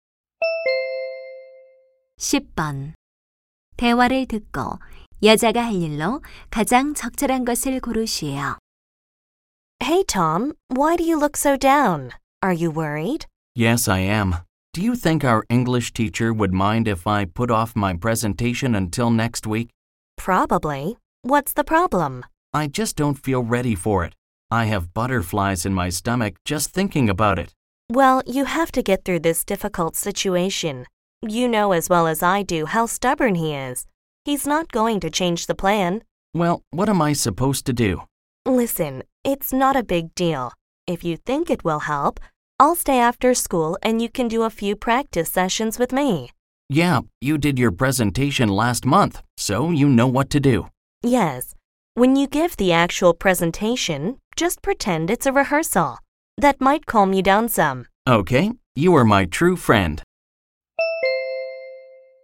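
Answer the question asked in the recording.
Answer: 방과 후 남자의 발표 연습 도와주기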